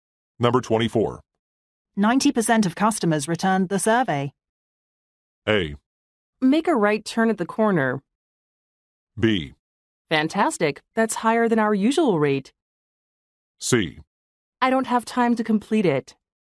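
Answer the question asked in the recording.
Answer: B: Fantastic. That's higher than our usual rate.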